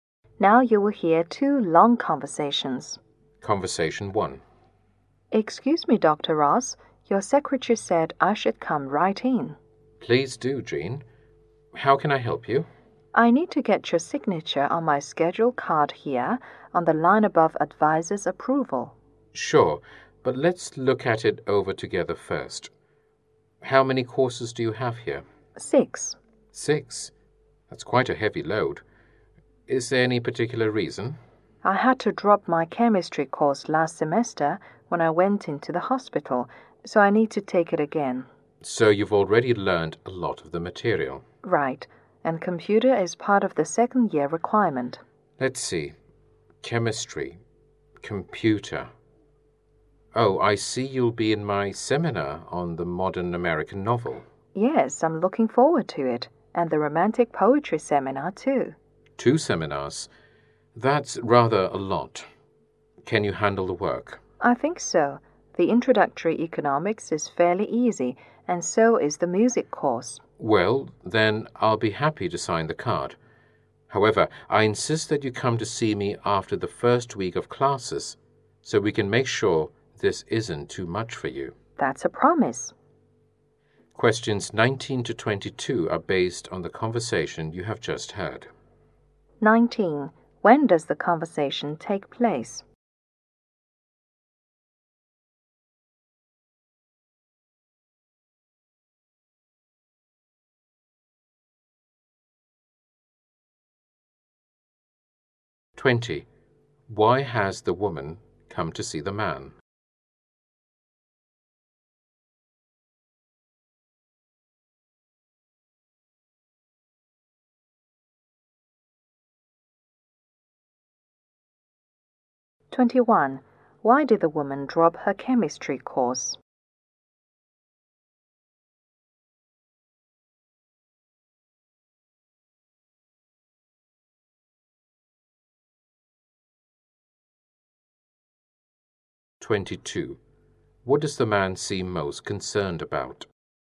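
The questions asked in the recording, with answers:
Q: Why has the woman come to see the man?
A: To get his signature on her schedule card

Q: Why did the woman drop her chemistry course?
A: She went into the hospital.

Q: What does the man seem most concerned about?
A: That her course load is too heavy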